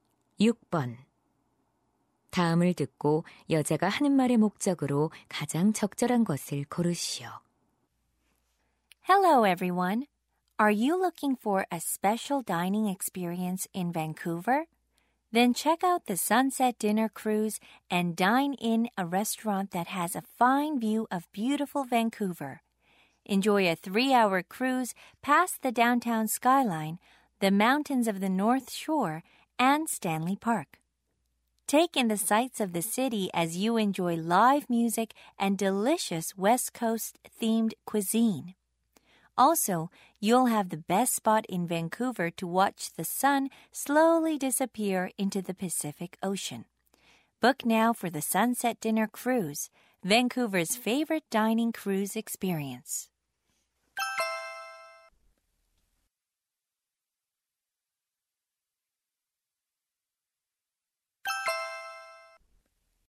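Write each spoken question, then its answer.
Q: 다음을 듣고 여자가 하는 말의 목적으로 가장 적절한 것을 고르시오.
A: 선셋 디너 크루즈를 홍보하려고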